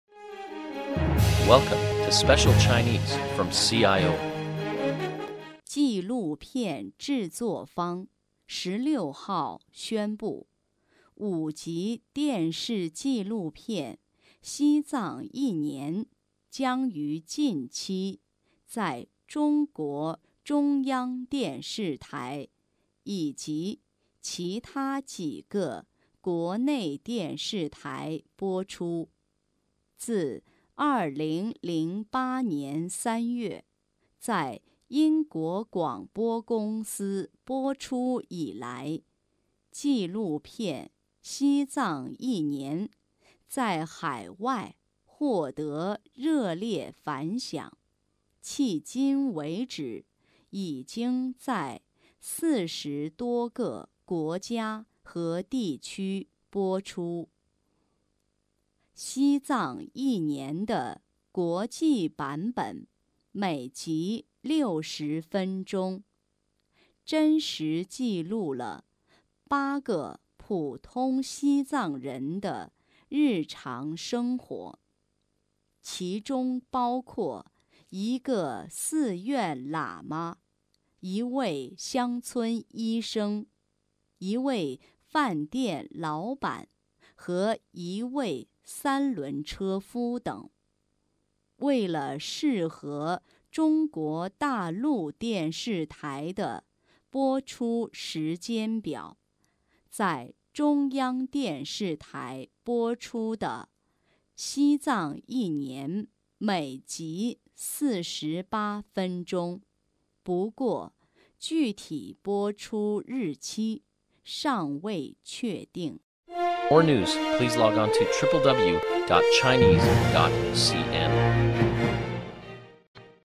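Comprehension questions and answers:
Please answer the following questions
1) BBC电视纪录片《西藏一年》一共有多少集?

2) BBC电视纪录片《西藏一年》是什么时候在英国播放的?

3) 《西藏一年》记录了8个普通西藏人的日常生活,请列出三个人。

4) 将在中央电视台播出的《西藏一年》每集多长时间?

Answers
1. 五集
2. 2008年3月
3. 寺院喇嘛、乡村医生、饭店老板(或三轮车夫)
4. 48分钟

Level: M.Phil Year 2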